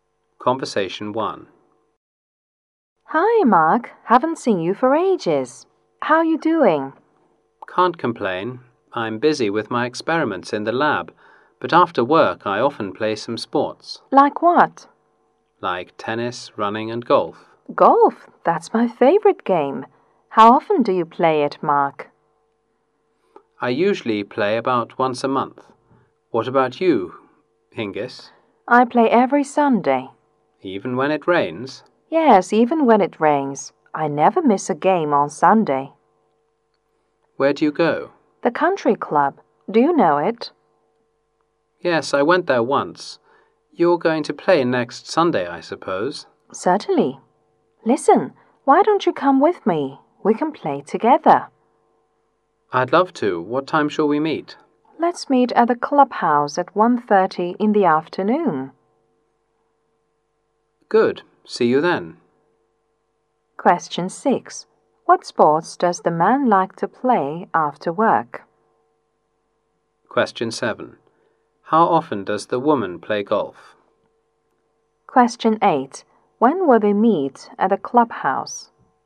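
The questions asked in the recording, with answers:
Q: What sports does the man like to play after work?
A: Tennis, running and golf

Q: How often does the woman play golf?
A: Every Sunday

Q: When will they meet at the clubhouse?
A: At 1:30 in the afternoon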